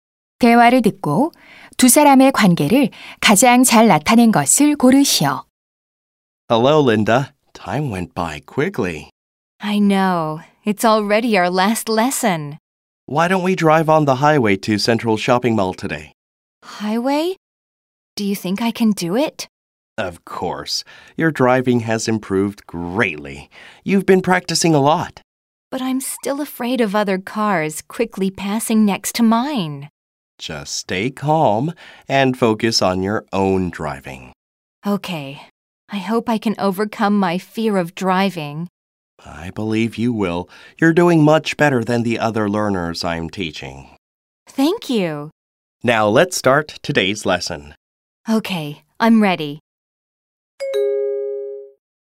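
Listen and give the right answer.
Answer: 운전 강사 - 수강생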